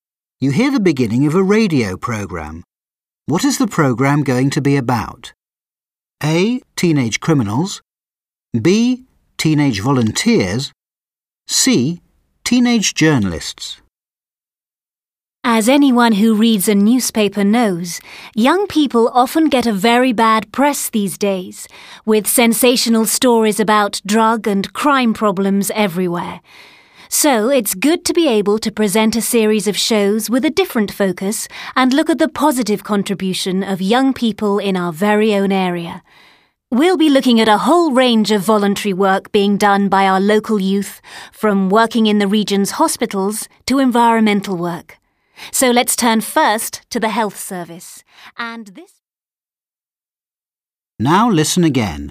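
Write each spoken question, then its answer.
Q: What is the program going to be about?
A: B: teenage volunteers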